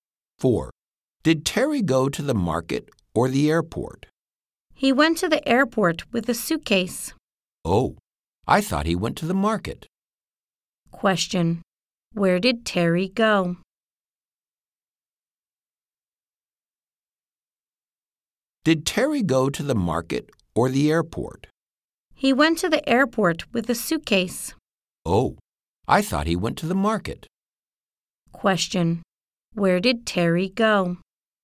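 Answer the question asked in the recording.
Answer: To the airport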